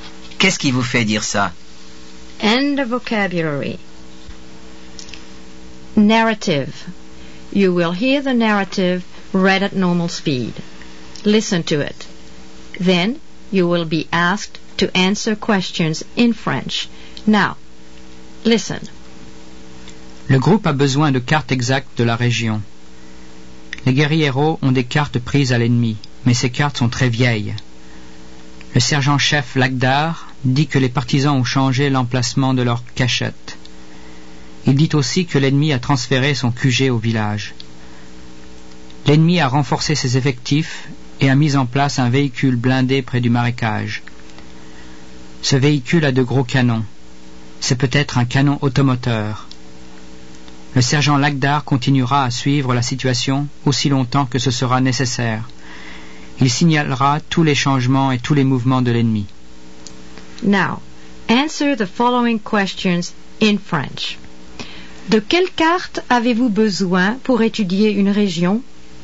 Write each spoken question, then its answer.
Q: De quelle carte avez-vous besoin pour étudier une région?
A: On a besoin de cartes exactes.